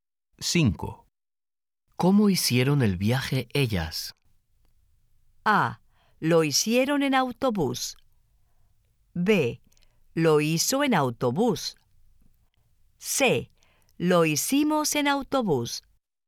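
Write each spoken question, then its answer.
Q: ¿Cómo hicieron el viaje ellas?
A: A: Lo hicieron en autobús.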